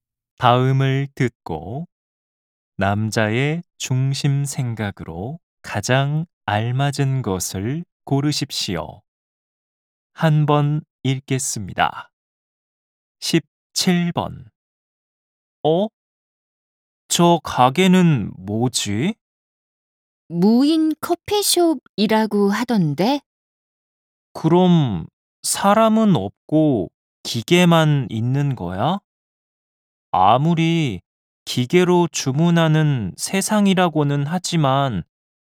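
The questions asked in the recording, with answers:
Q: 다음을 듣고 남자의 중심 생각으로 가장 알맞은 것을 고르십시오.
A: 관리하는 직원이 없으면 가게 운영이 어렵다.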